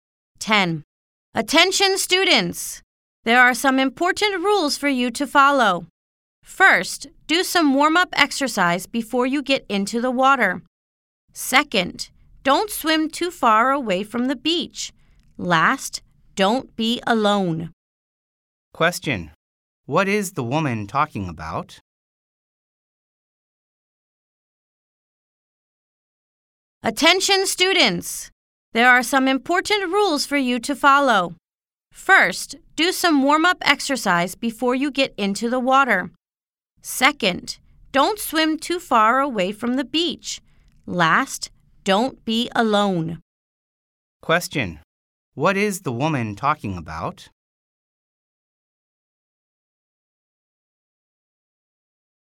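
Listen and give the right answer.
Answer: Swimming safety rules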